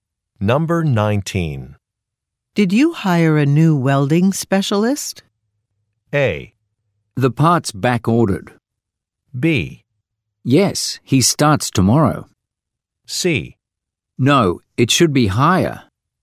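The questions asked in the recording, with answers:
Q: Did you hire a new welding specialist?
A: B: Yes, he starts tomorrow.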